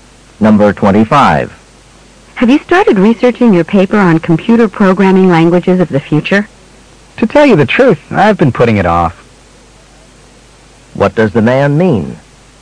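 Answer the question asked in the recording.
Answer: He hasn't started his research yet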